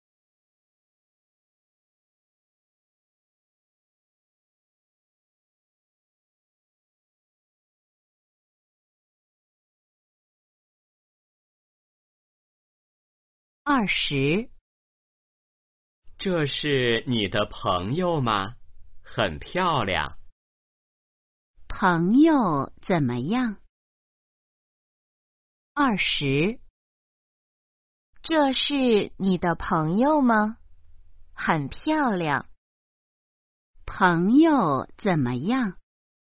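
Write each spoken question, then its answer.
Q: 朋友怎么样?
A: 很漂亮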